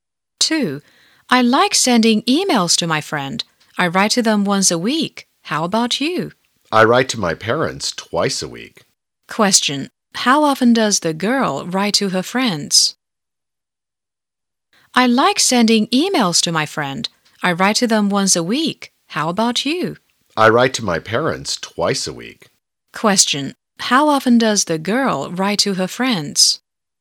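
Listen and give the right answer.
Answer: Once a week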